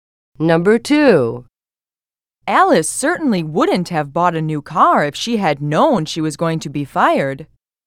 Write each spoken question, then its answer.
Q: Alice certainly wouldn't have bought a new car if she had known she was going to be fired.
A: Past is the correct answer.